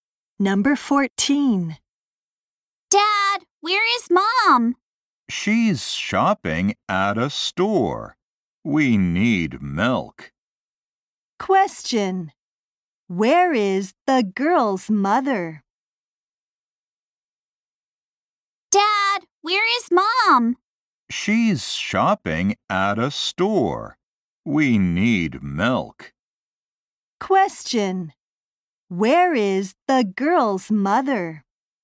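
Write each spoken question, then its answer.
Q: Question. Where is the girl's mother?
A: At a store.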